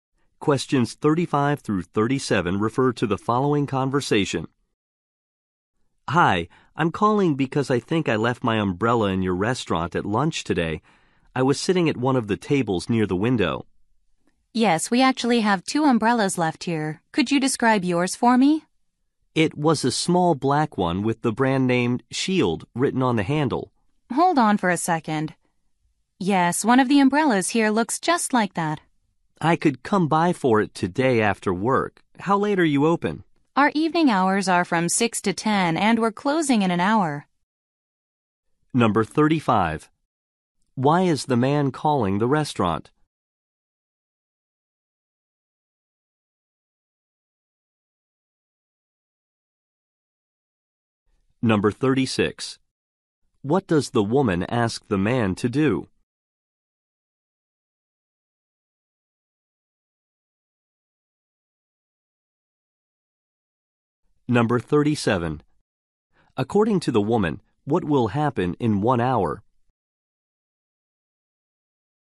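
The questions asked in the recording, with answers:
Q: Why is the man calling the restaurant?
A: He left his umbrella there

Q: What does the woman ask the man to do?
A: Describe his umbrella

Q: According to the woman, what will happen in 1 hour?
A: The restaurant will close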